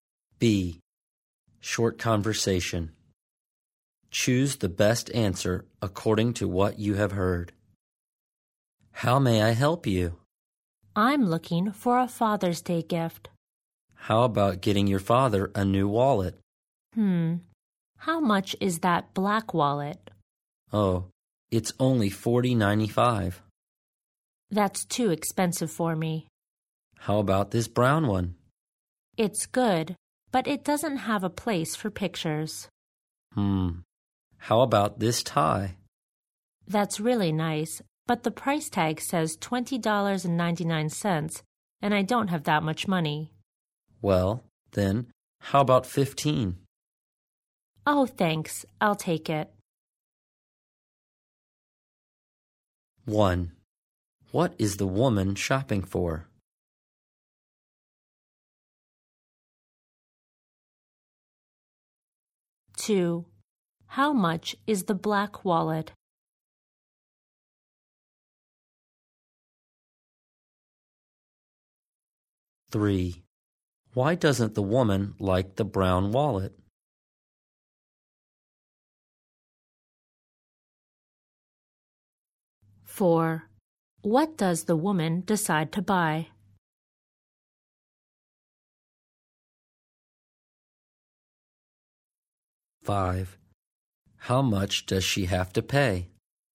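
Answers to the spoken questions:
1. A Father's Day gift
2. $40.95
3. It doesn't have a place for pictures
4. A tie
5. $15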